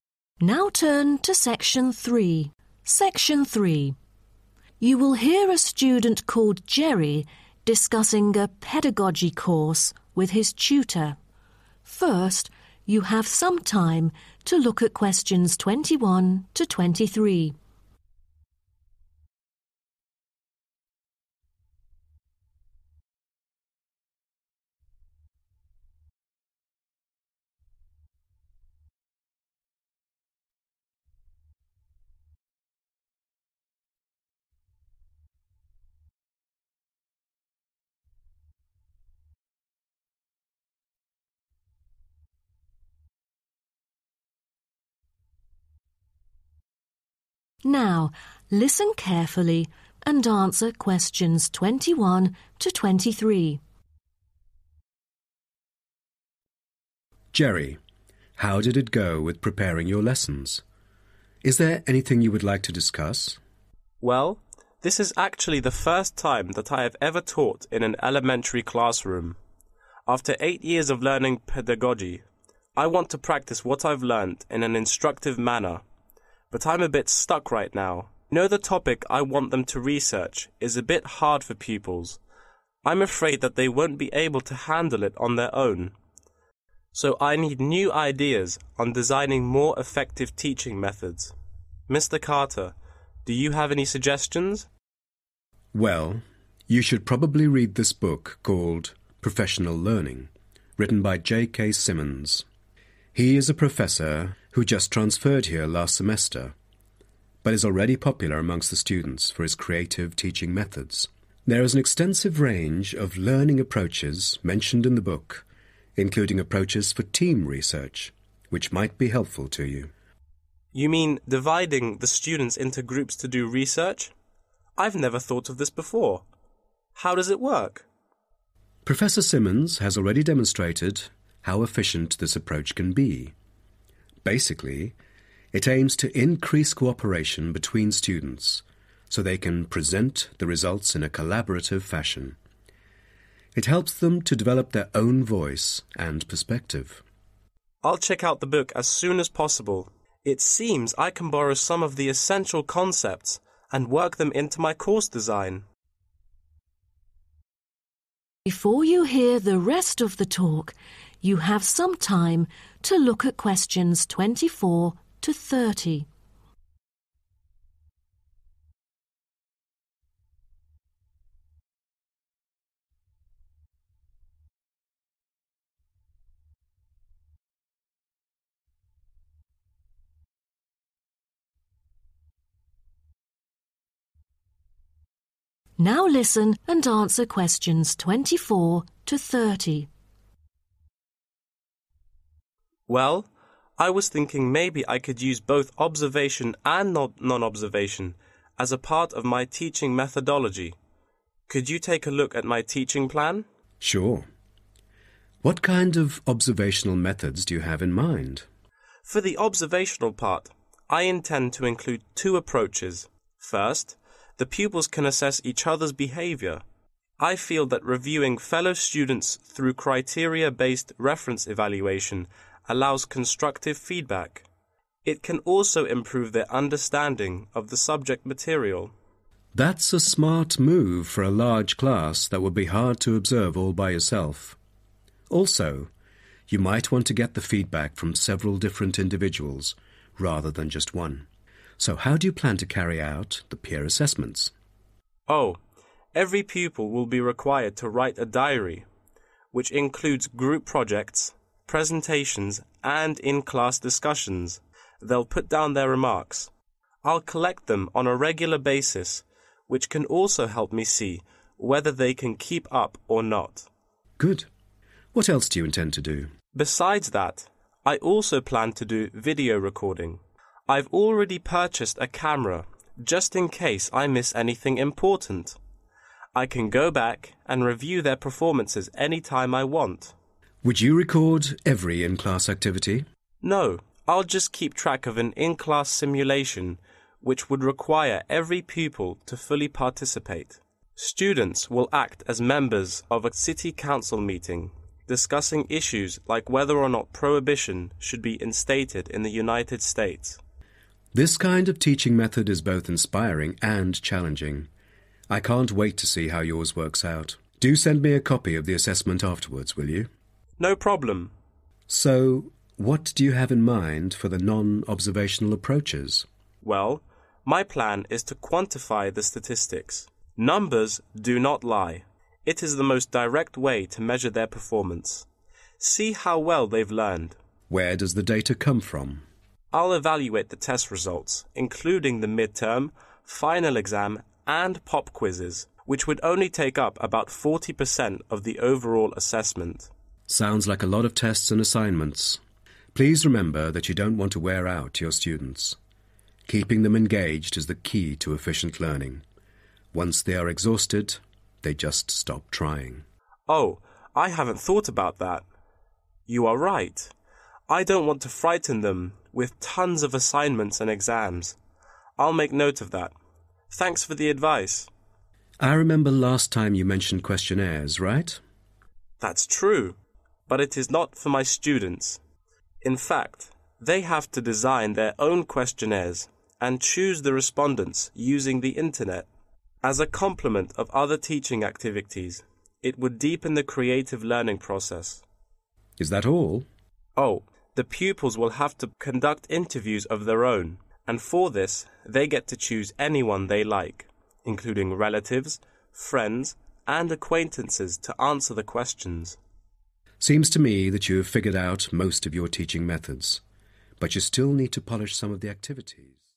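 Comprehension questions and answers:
Complete the sentences below. Write NO MORE THAN TWO WORDS for each answer.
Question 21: The new teacher who is very popular among students wrote a book titled 21.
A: Professional Learning

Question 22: It covers techniques including doing research as part of a 22.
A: team

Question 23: The objective is for the students to present 23. in a collaborative manner.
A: results

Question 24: Students: examine the 24. of peer pupils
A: behaviour

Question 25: Keep a 25.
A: diary

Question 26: Carry out 26.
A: video recording

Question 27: In-class 27.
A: simulation

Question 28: Evaluate 28.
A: test results

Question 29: With the help of 29. to identify respondents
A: the internet

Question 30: Choose own respondents to do 30.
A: interviews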